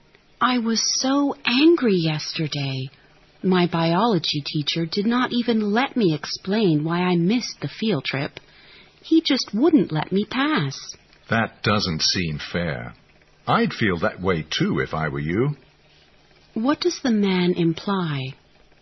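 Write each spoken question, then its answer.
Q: What does the man imply?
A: He understands why she is angry; her anger is justified.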